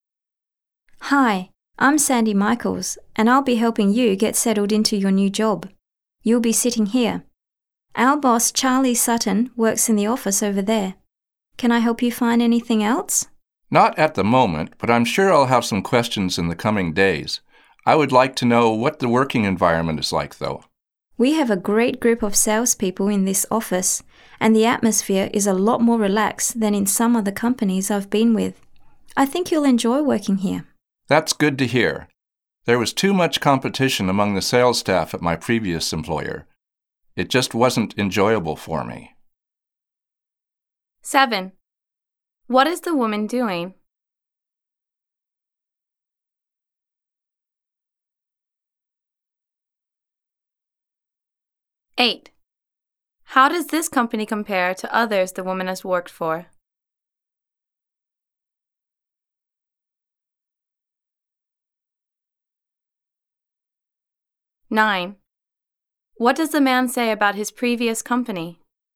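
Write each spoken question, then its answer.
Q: What is the woman doing?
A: Helping a new employee get settled into his job

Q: How does this company compare to others the woman has worked for?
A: The atmosphere is a lot more relaxed

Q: What does the man say about his previous company?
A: There was too much competition among the sales staff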